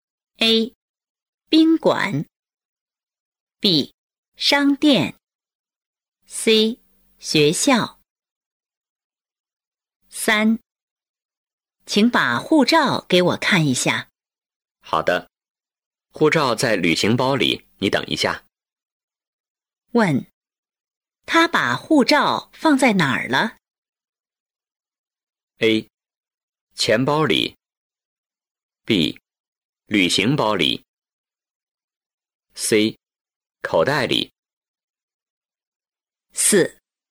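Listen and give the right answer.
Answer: B: 旅行包里。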